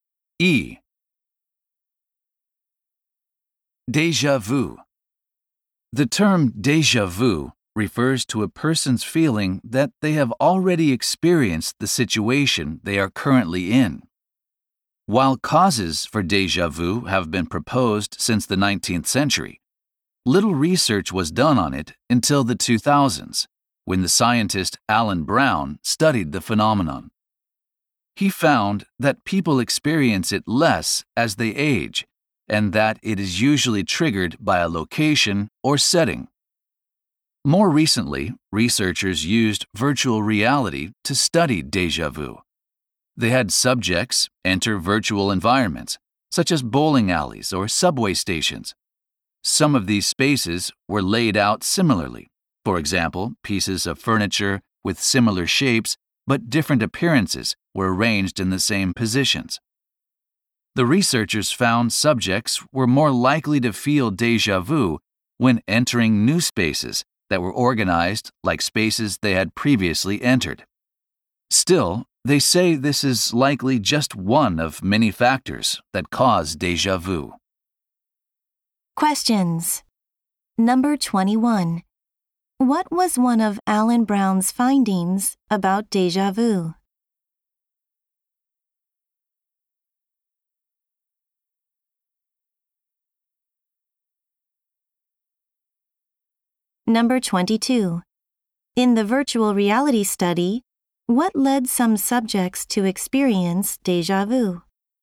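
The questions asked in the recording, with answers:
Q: What was one of Alan Brown's findings about déjà vu?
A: People experience it less as they age.

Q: In the virtual reality study, what led some subjects to experience déjà vu?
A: Entering new spaces laid out like spaces they had entered before.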